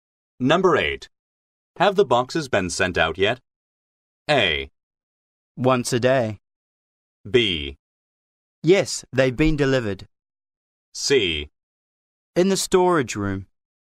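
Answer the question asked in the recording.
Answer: B: Yes, they've been delivered.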